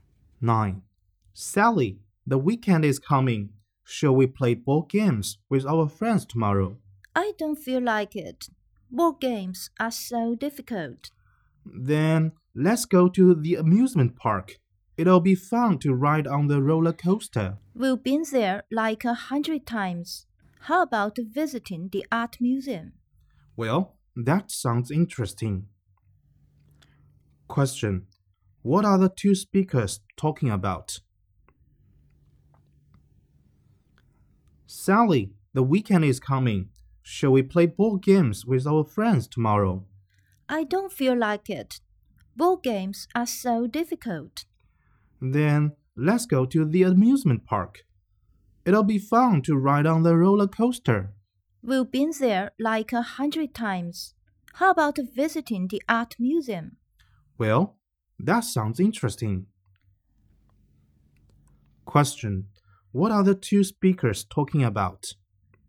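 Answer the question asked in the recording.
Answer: Their weekend plans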